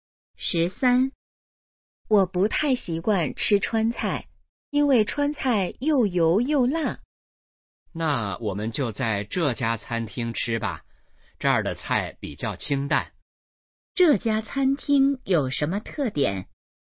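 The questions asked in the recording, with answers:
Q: 这家餐厅有什么特点?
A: 菜比较清淡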